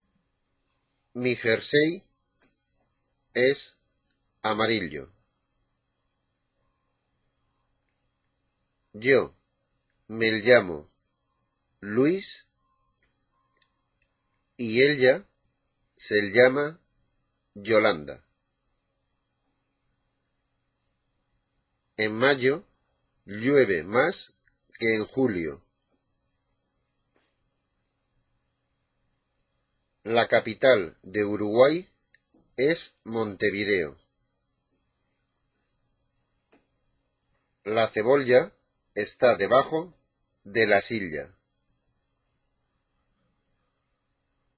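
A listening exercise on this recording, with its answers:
Listen to the sentences and write "i", "y" or "ll" in the corresponding gaps.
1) Mi jerse es amario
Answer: y, ll

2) o me amo Lus ea se ama olanda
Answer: Y, ll, i, ll, ll, Y

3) En mao ueve más que en julio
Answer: y, ll

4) La capital de Urugua es Montevdeo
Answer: y, i

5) La ceboa está debajo de la sia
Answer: ll, ll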